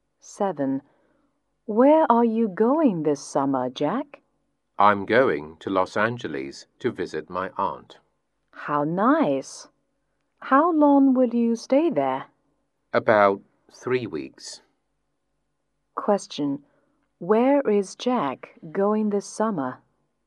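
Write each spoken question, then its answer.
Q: Question. Where is Jack going this summer?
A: Los Angeles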